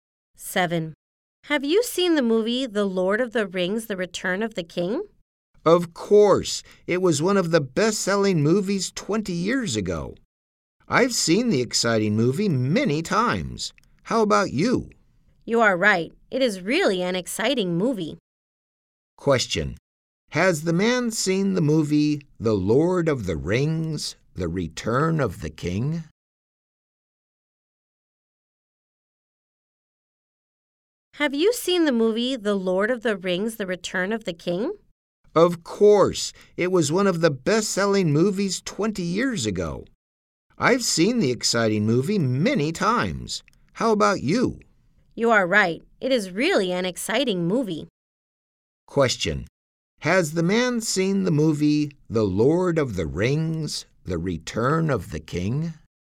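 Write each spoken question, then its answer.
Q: Question. Has the man seen the movie The Lord of the Rings, The Return of the King?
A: Yes, he has.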